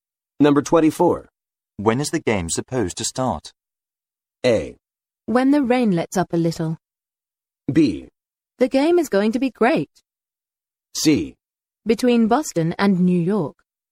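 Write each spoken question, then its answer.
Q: When is the game supposed to start?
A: A: When the rain lets up a little.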